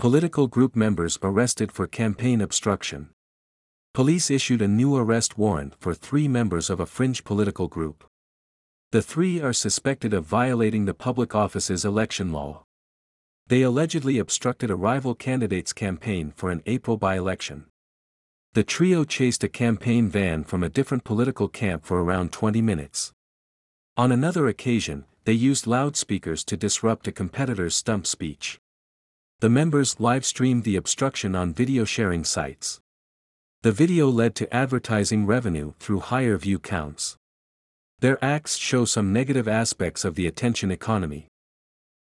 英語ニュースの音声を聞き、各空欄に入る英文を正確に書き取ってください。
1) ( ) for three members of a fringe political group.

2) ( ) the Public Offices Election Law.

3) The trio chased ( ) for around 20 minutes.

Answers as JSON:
{"1": "Police issued a new arrest warrant", "2": "The three are suspected of violating", "3": "a campaign van from a different political camp"}

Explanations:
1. ⇒ ニュース英語に頻出の語彙が足りなければ、聞き取れなくて当然です。この単語を知らなかった人は、普段から英文記事を読む習慣をつけて語彙を増やしましょう。
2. ⇒ 「be suspected of A(Aの容疑がある)」は英語ニュースに頻出の表現です。Aには名詞や動名詞が入ります。この表現を知っていれば、弱音の「of」を難なく聞き取れるはずです。

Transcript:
Political Group Members Arrested for Campaign Obstruction
Police issued a new arrest warrant for three members of a fringe political group.
The three are suspected of violating the Public Offices Election Law.
They allegedly obstructed a rival candidate's campaign for an April by-election.
The trio chased a campaign van from a different political camp for around 20 minutes.
On another occasion, they used loudspeakers to disrupt a competitor's stump speech.
The members live-streamed the "obstruction" on video-sharing sites.
The video led to advertising revenue through higher view counts.
Their acts show some negative aspects of the "attention economy."

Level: 中級脱出